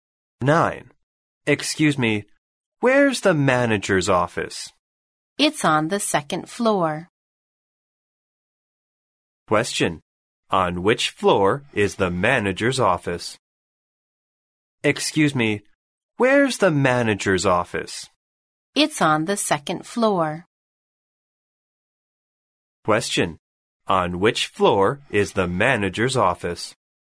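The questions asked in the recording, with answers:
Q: On which floor is the manager's office?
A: The second floor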